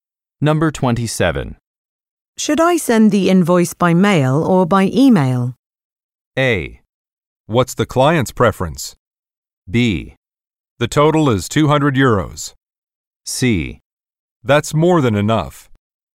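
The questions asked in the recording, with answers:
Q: Should I send the invoice by mail or by email?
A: A: What's the client's preference?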